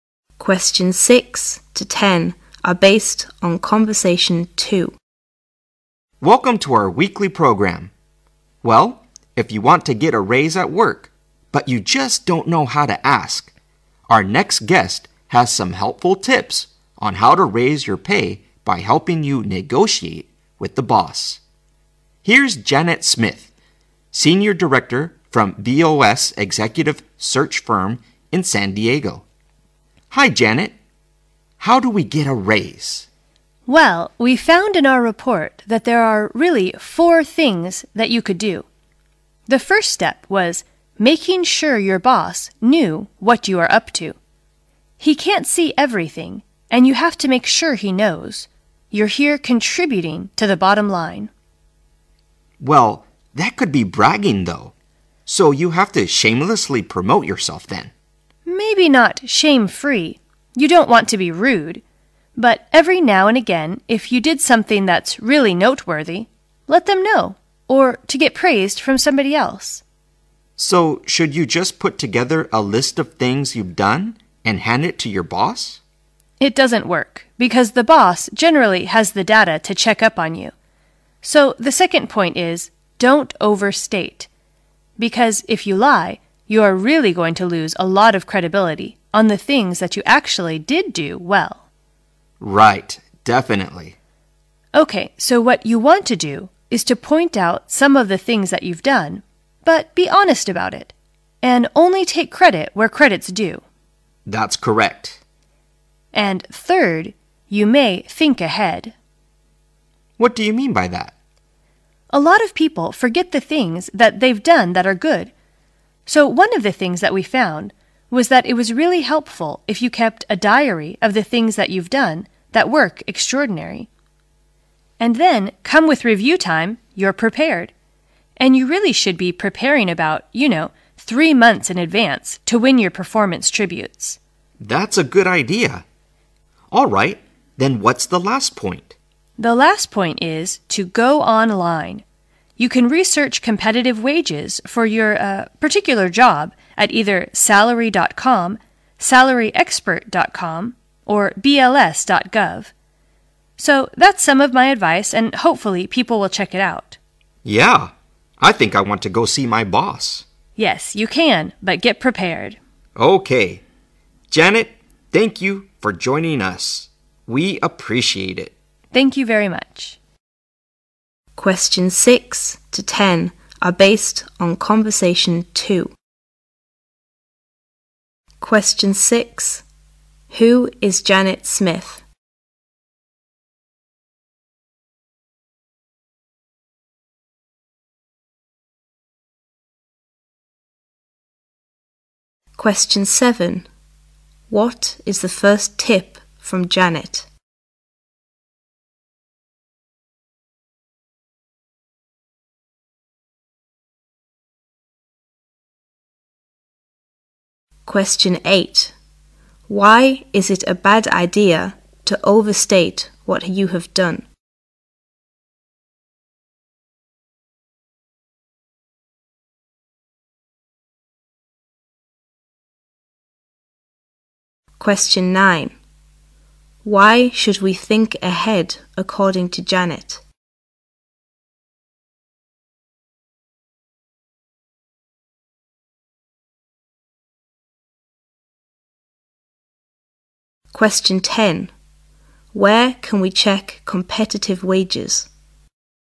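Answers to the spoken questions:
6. Senior Director from BOS Executive Search Firm in San Diego
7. Make sure your boss knows what you are doing
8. You lose credibility; the boss can check the data
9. People forget the good things they've done, so keep a diary to be prepared for review
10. Online, at salary.com, salaryexpert.com or bls.gov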